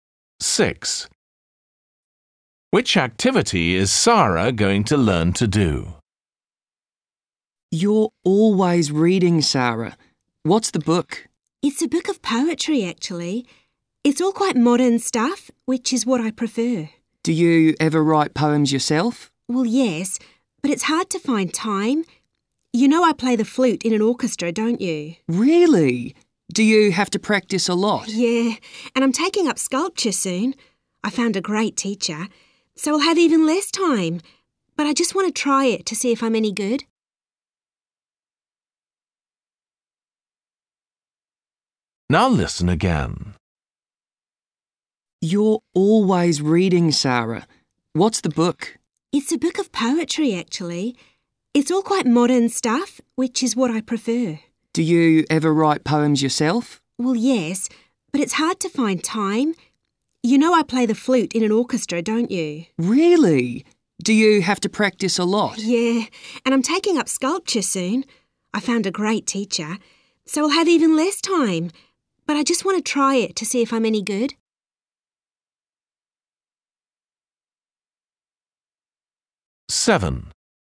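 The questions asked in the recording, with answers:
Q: Which activity is Sara going to learn to do?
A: sculpture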